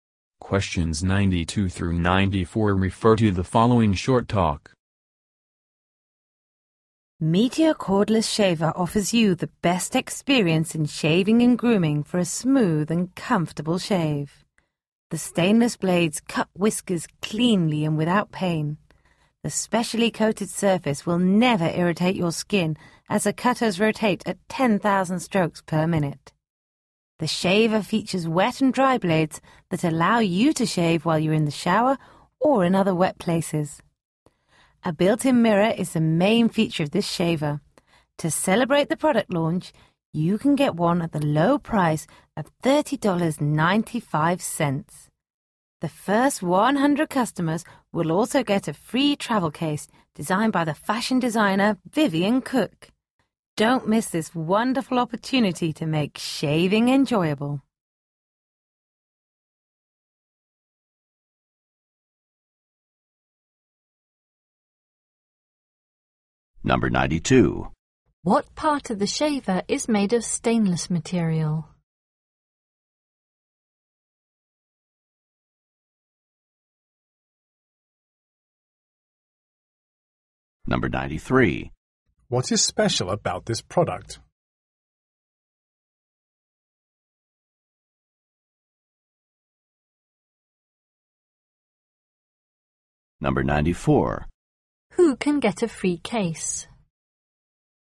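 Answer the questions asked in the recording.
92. The blades
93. It has a built-in mirror
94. The first 100 customers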